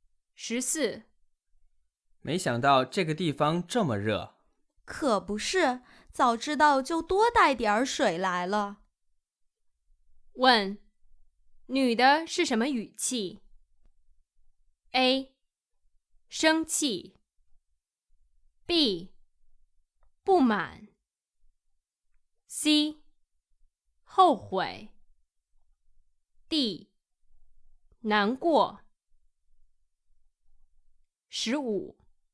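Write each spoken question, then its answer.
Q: 问,女的是什么语气? A.生气。 B. 不满。 C. 后悔。 D. 难过。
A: C: 后悔。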